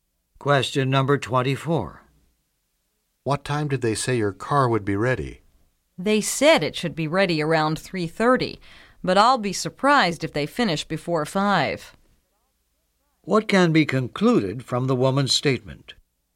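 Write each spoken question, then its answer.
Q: What can be concluded from the woman's statement?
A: The car probably won't be ready until 5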